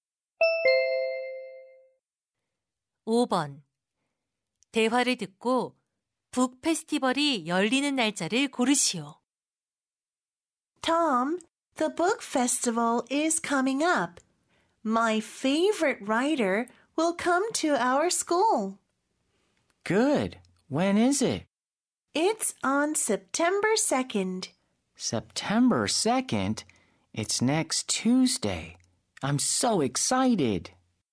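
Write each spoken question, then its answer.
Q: 대화를 듣고 북 페스티벌이 열리는 날짜를 고르시오.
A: 9월 2일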